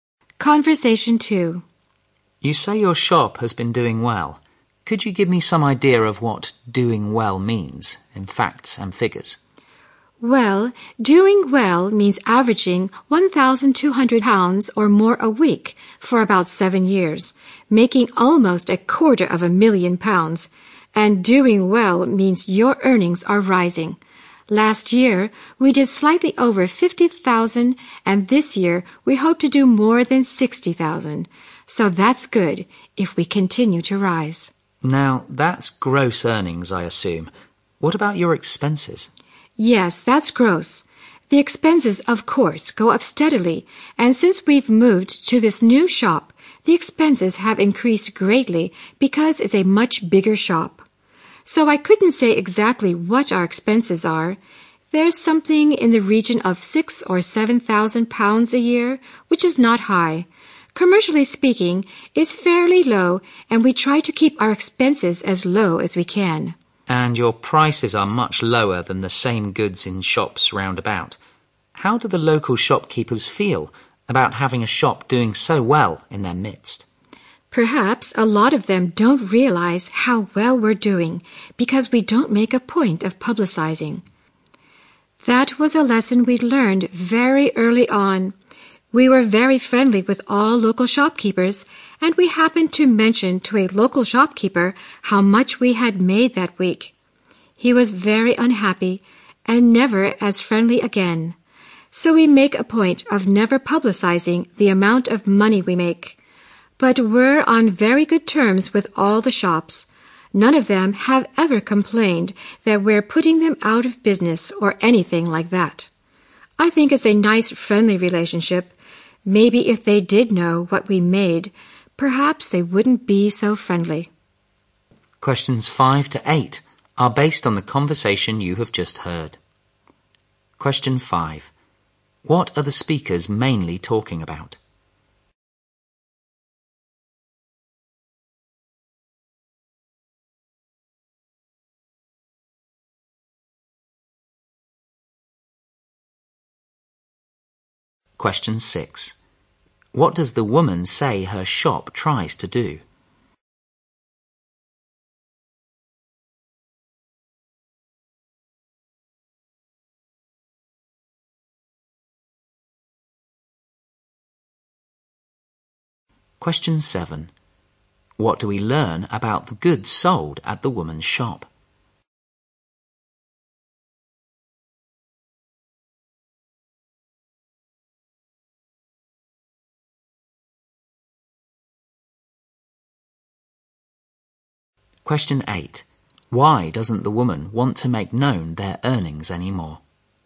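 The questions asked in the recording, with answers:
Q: What are the speakers mainly talking about?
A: How well the woman's shop is doing.

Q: What does the woman say her shop tries to do?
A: Keep its expenses as low as possible.

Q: What do we learn about the goods sold at the woman's shop?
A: They are much cheaper than in nearby shops.

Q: Why doesn't the woman want to make known their earnings anymore?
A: A local shopkeeper became unfriendly after she told him.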